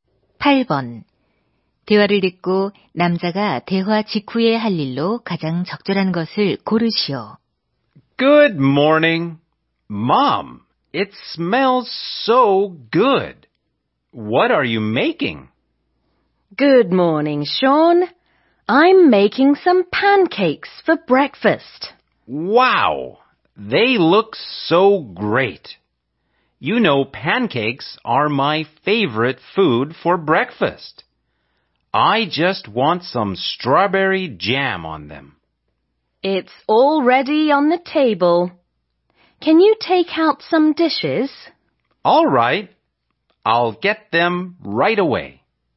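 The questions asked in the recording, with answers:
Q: 대화를 듣고 남자가 대화 직후에 할 일로 가장 적절한 것을 고르시오.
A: 접시 꺼내기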